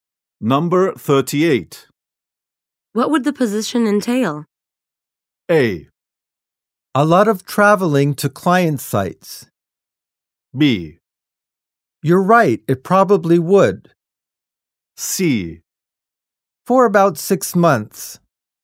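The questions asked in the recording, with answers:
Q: What would the position entail?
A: A: A lot of traveling to client sites.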